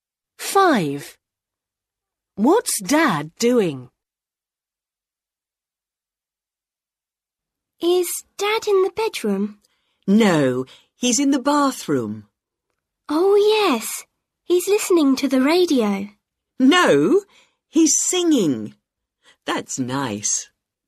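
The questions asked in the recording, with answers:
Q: What's Dad doing?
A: Singing in the bathroom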